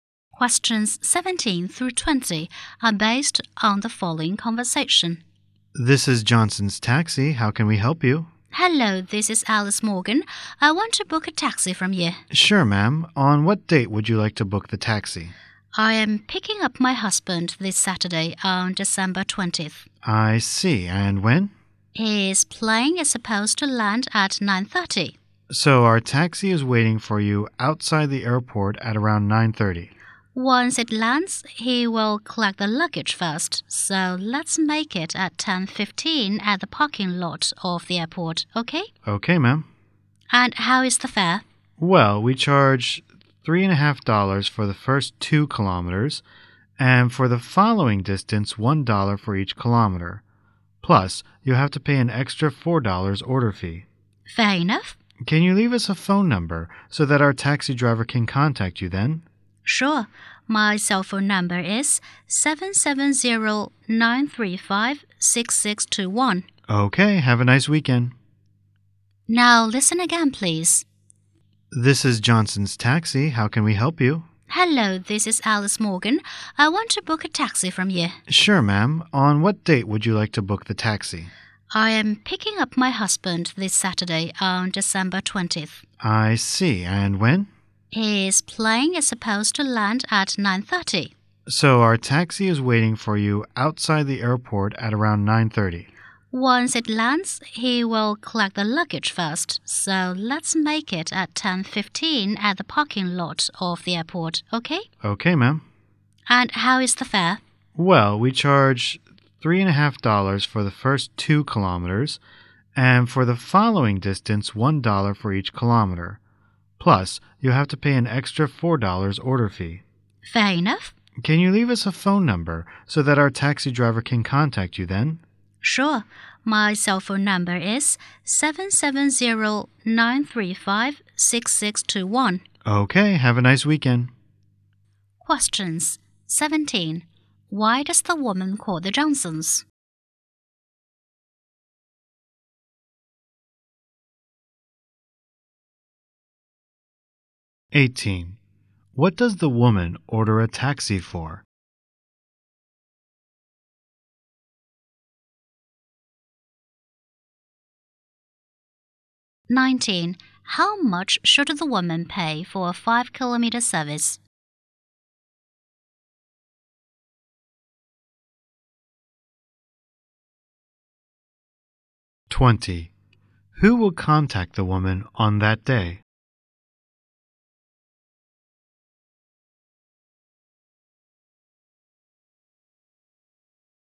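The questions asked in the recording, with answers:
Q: Why does the woman call the Johnsons?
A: To book a taxi.

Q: What does the woman order a taxi for?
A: To pick up her husband at the airport.

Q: How much should the woman pay for a 5-kilometer service?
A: $10.50.

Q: Who will contact the woman on that day?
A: The taxi driver.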